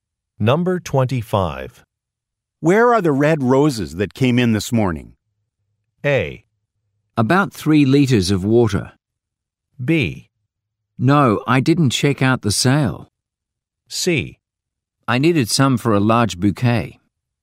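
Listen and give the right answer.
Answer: C: I needed some for a large bouquet.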